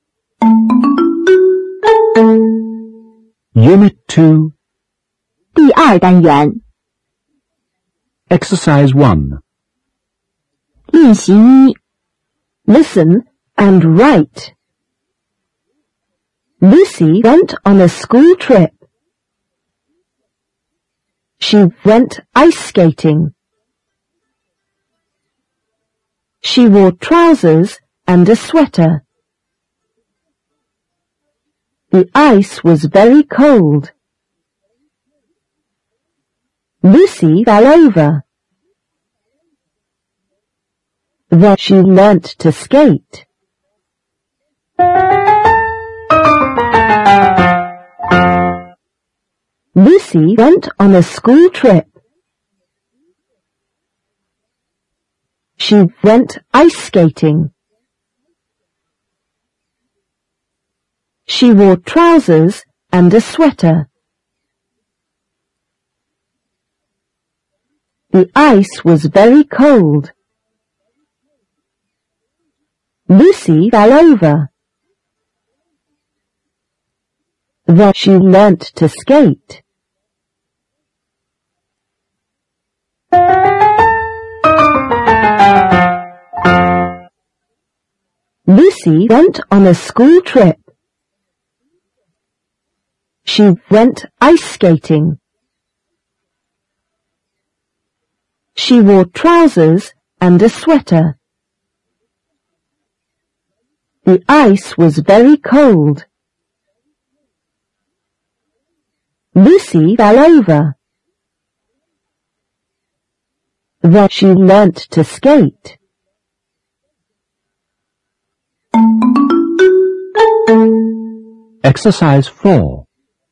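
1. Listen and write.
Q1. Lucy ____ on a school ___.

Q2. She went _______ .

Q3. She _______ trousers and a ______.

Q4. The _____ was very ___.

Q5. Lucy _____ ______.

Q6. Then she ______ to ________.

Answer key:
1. went; trip
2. ice skating
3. wore; sweater
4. ice; cold
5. fell over
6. learnt; skate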